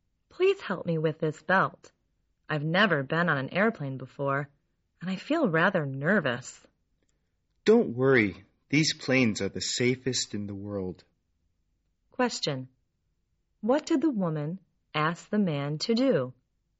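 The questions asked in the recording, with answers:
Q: What did the woman ask the man to do?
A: Help her fasten her seat belt.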